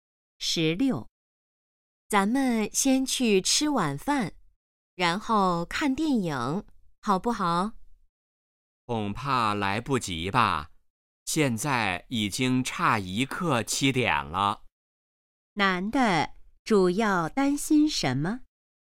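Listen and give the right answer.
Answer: 时间来不及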